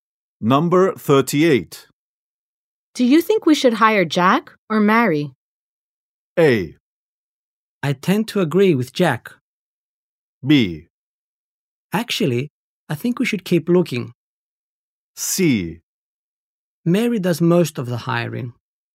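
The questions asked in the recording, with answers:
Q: Do you think we should hire Jack or Mary?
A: B: Actually, I think we should keep looking.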